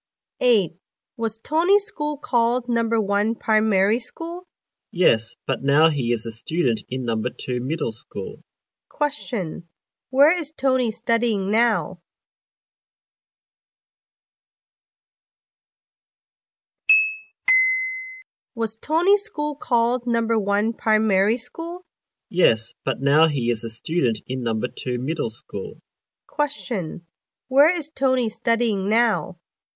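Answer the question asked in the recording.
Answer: In Number 2 Middle School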